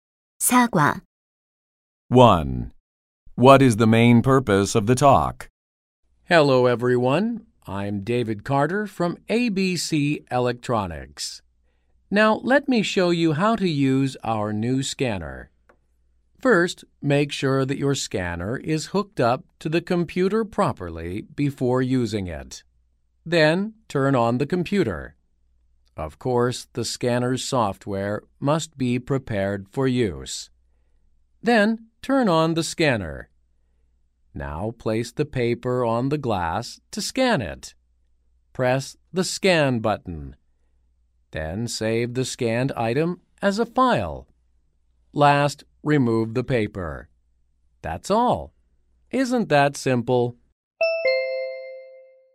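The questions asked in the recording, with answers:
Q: What is the main purpose of the talk?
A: To explain how to use the new scanner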